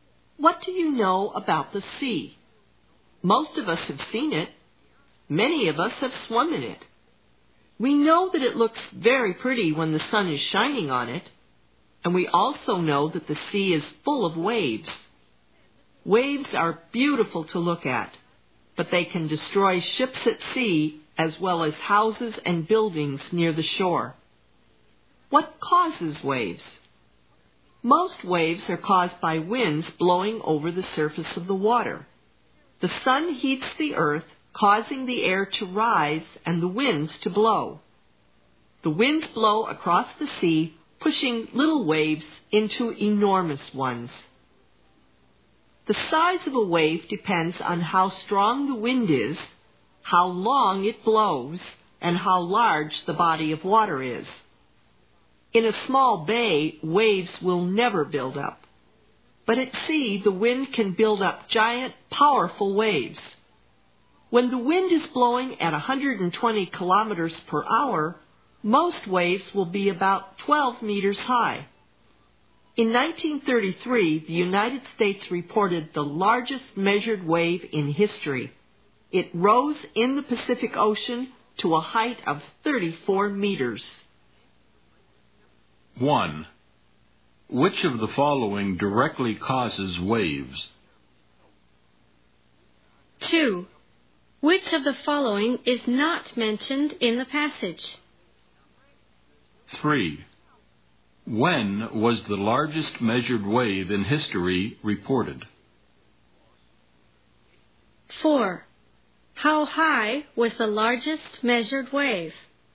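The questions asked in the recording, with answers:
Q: Which of the following directly causes waves?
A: Winds blowing over the water

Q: When was the largest measured wave in history reported?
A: In 1933

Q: How high was the largest measured wave?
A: 34 meters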